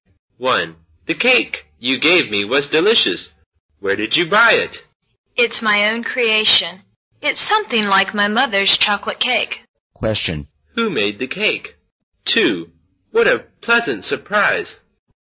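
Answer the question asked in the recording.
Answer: The second speaker made it herself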